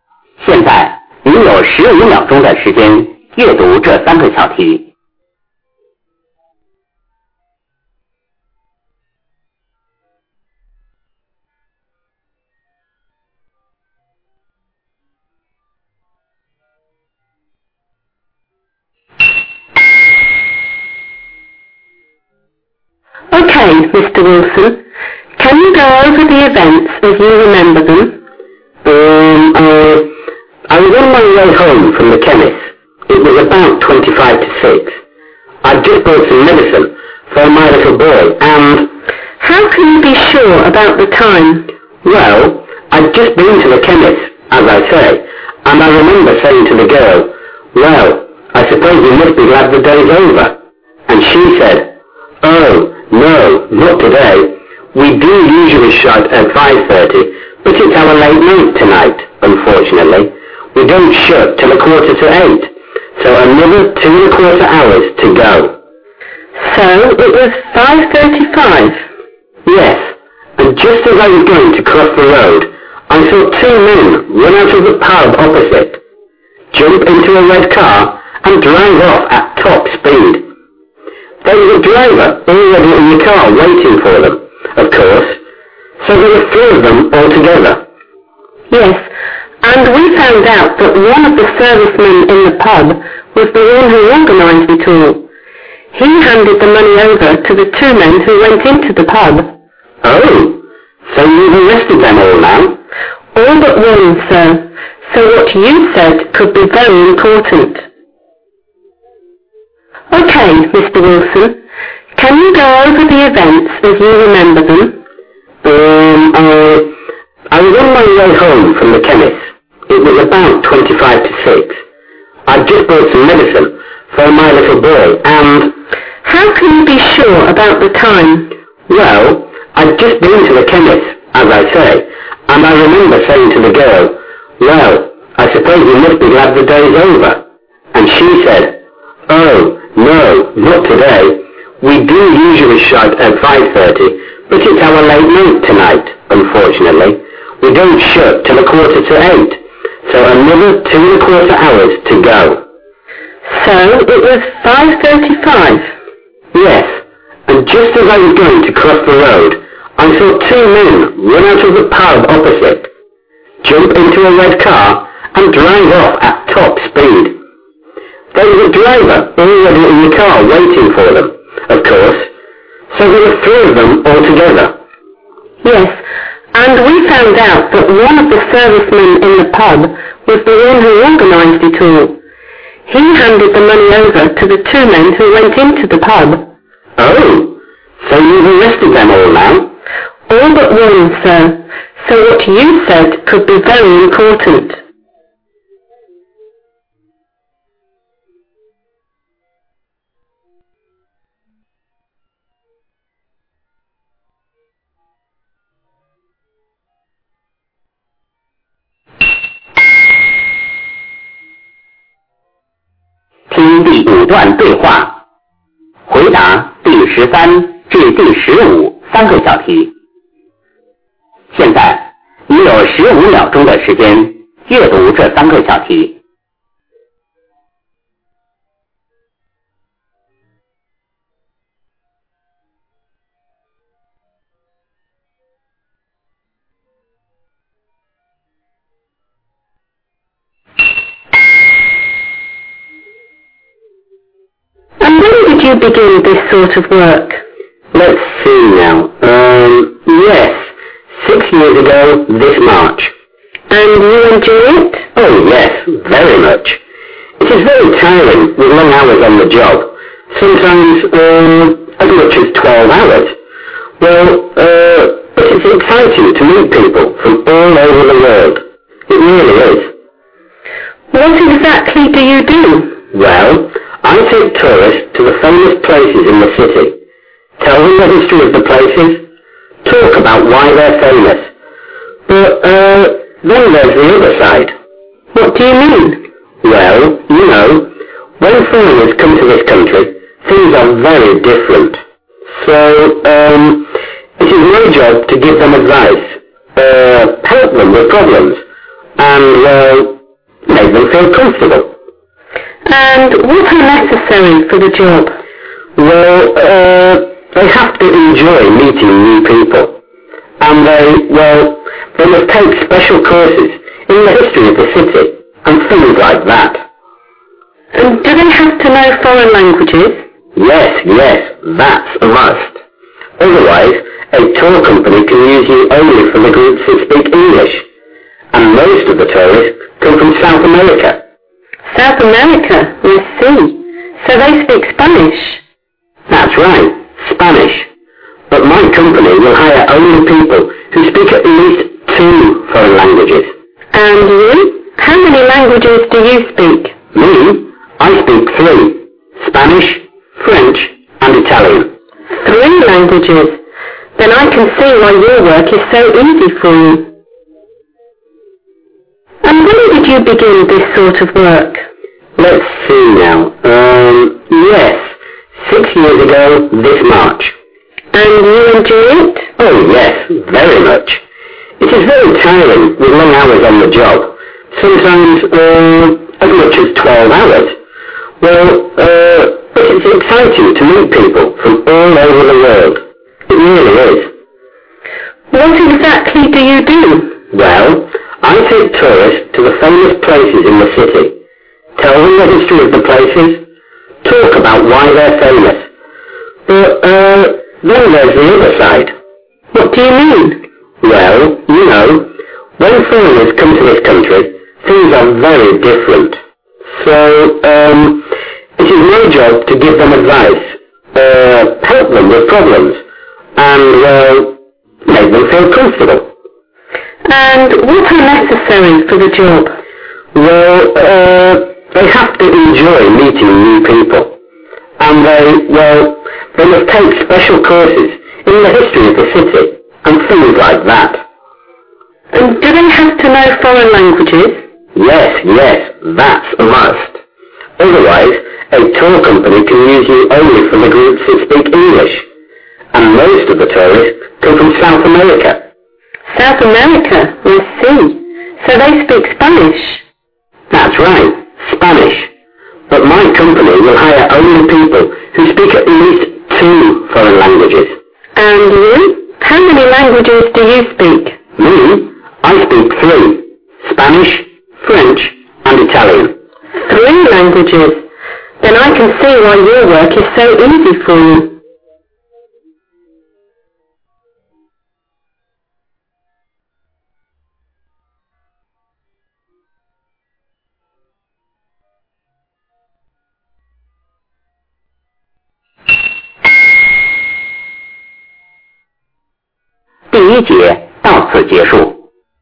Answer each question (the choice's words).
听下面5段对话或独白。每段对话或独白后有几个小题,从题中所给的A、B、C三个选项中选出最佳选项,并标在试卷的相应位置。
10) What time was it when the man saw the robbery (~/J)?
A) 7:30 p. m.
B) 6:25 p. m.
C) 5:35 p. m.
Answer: 5:35 p. m.

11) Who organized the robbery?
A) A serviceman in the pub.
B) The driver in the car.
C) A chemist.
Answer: A serviceman in the pub.

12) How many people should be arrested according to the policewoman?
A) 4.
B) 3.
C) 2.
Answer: 4.

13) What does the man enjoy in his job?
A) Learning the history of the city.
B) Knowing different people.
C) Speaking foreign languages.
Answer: Knowing different people.

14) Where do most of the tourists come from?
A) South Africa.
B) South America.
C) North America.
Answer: South America.

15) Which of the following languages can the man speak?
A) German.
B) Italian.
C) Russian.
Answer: Italian.